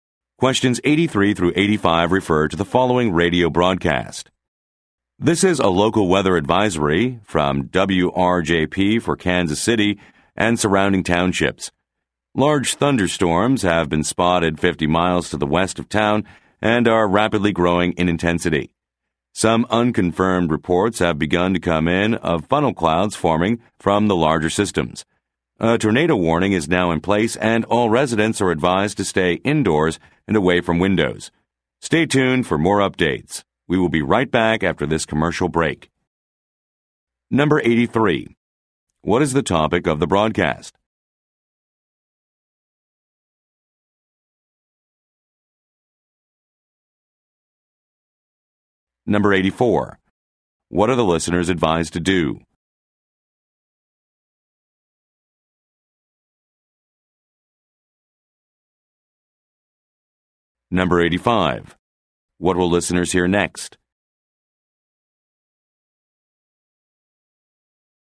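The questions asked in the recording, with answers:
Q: What is the topic of the broadcast?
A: Severe weather / a tornado warning

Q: What are the listeners advised to do?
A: Stay indoors and away from windows

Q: What will listeners hear next?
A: A commercial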